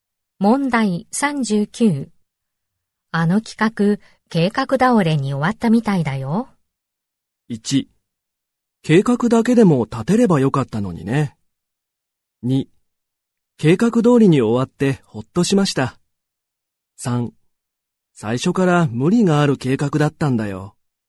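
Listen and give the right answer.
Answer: 3: 最初から無理がある計画だったんだよ。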